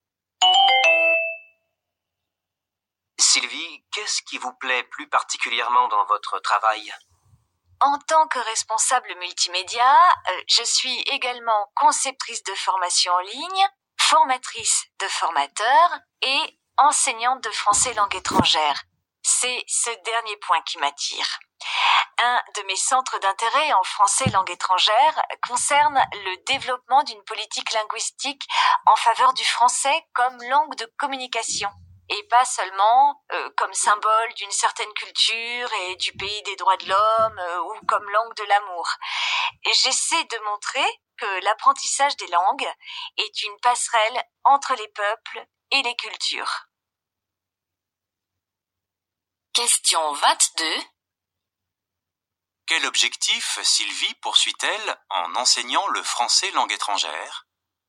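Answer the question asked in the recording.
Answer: Promouvoir le français comme langue de communication, passerelle entre les peuples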